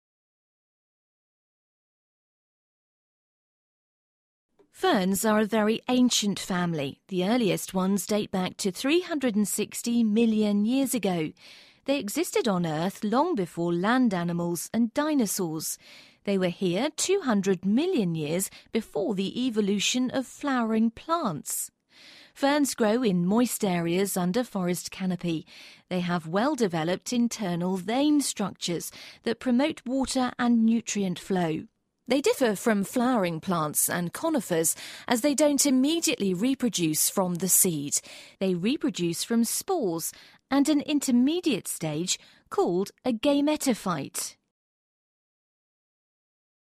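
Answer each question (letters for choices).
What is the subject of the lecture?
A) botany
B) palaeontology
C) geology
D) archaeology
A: A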